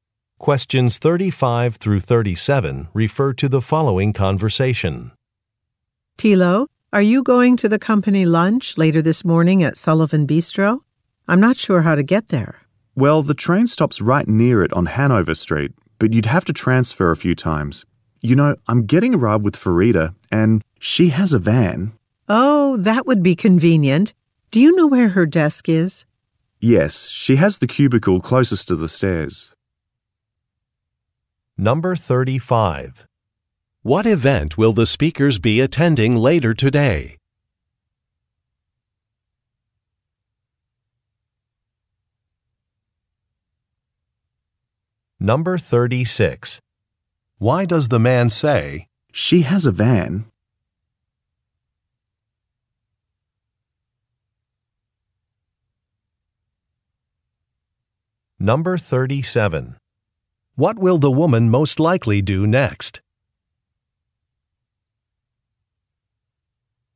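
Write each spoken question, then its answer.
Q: What event will the speakers be attending later today?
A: A company lunch

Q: Why does the man say,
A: To suggest the woman ride with Farida

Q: What will the woman most likely do next?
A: Go to Farida's desk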